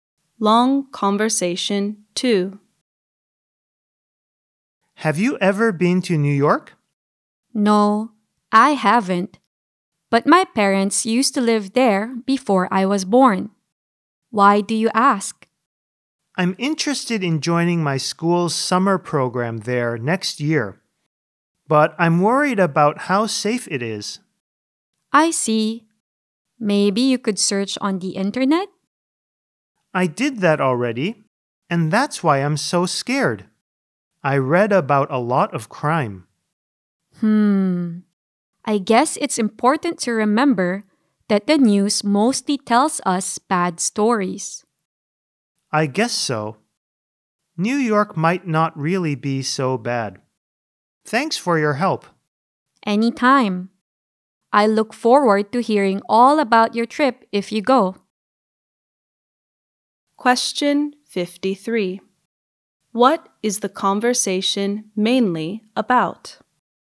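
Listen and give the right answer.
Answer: Worries about safety in New York for a summer program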